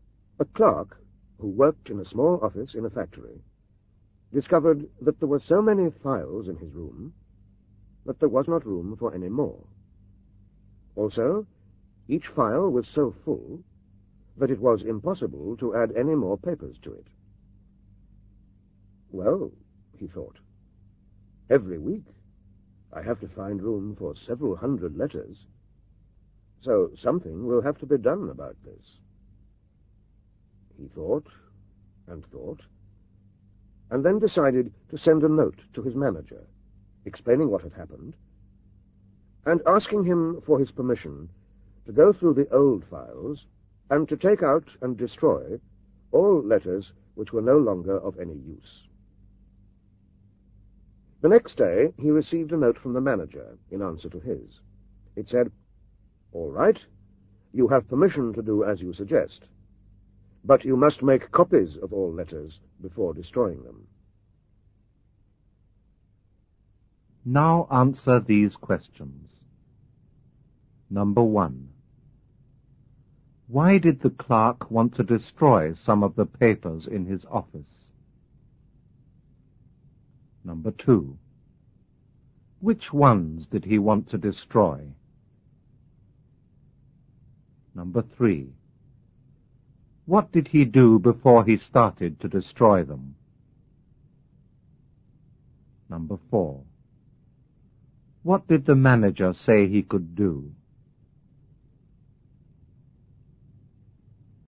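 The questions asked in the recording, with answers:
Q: Why did the clerk want to destroy some of the papers in his office?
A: Because there was no room for more files or papers

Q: Which ones did he want to destroy?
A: Old letters that were no longer of any use

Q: What did he do before he started to destroy them?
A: He sent a note to his manager asking for permission

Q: What did the manager say he could do?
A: He could destroy them, but only after making copies of all the letters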